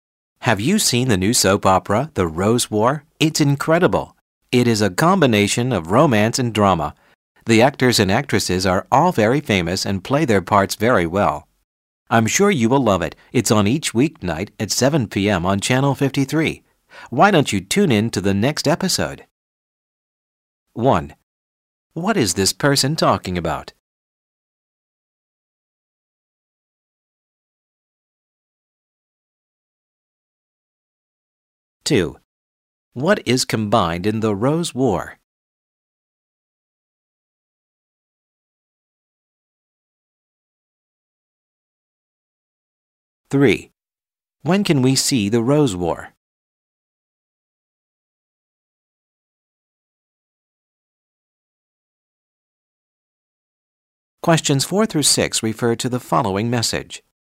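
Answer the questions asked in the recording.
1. A new soap opera
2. Romance and drama
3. Weeknights at 7 p.m. on Channel 53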